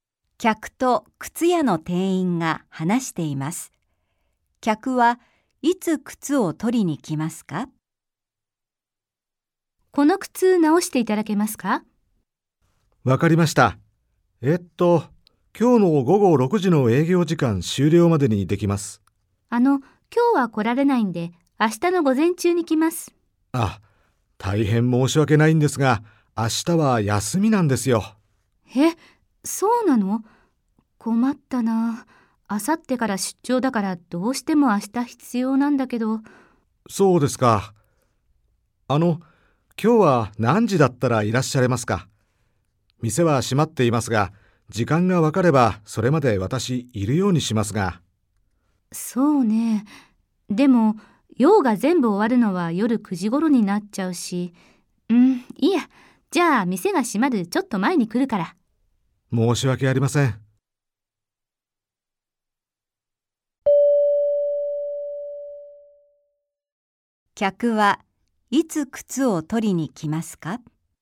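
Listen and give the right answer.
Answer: 今日、店が閉まる午後6時の少し前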